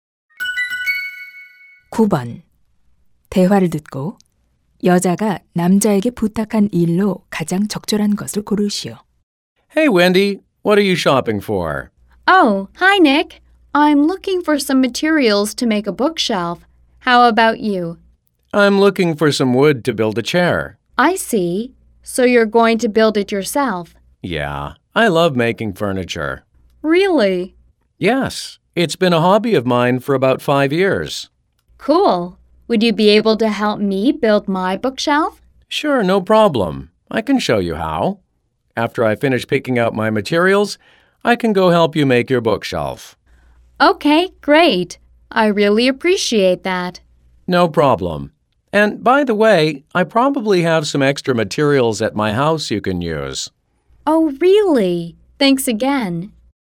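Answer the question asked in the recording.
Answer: 책장 만드는 것 도와주기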